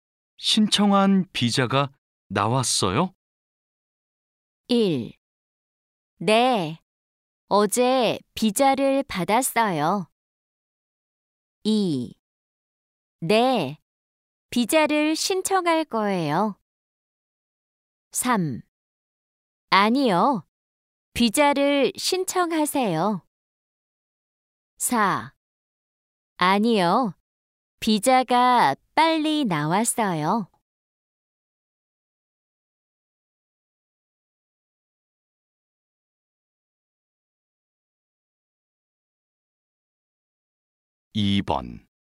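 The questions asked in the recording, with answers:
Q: 신청한 비자가 나왔어요?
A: 1: 네, 어제 비자를 받았어요.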